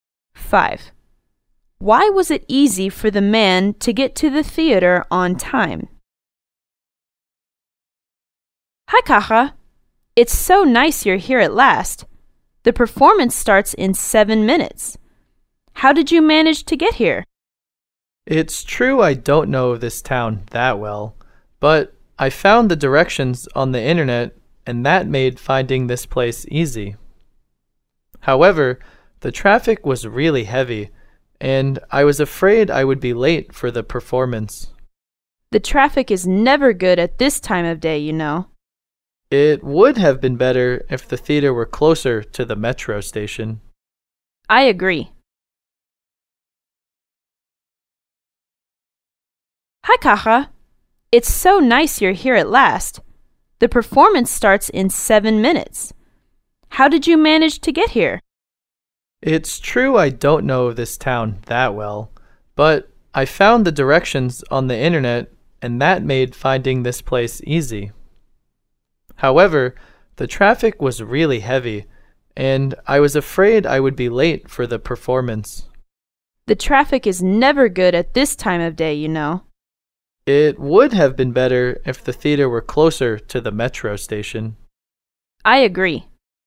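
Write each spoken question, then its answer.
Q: Why was it easy for the man to get to the theater on time?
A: He found the directions on the internet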